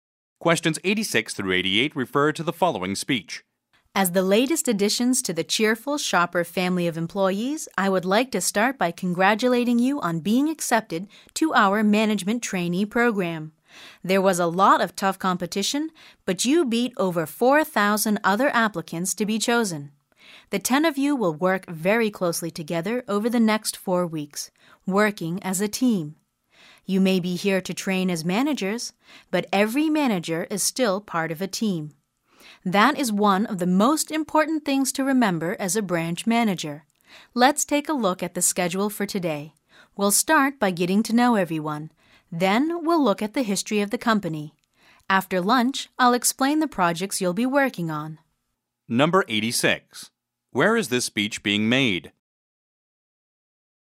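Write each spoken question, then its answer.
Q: Where is this speech being made?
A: At an orientation for new management trainees at Cheerful Shopper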